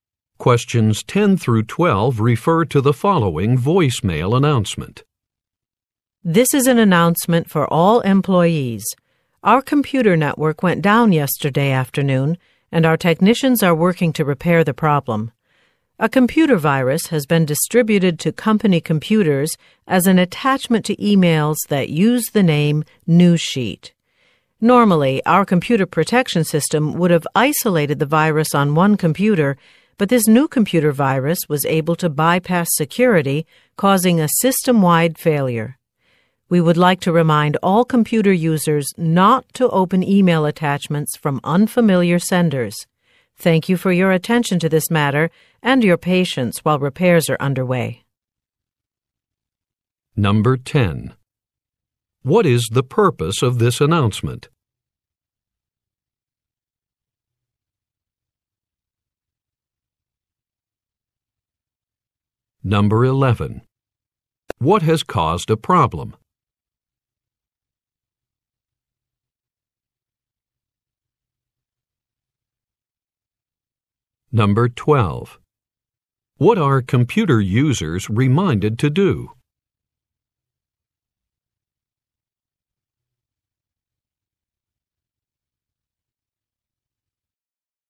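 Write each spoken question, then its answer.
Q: What is the purpose of this announcement?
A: To inform employees about a network failure caused by a virus

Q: What has caused a problem?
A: A computer virus in email attachments

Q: What are computer users reminded to do?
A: Not to open email attachments from unfamiliar senders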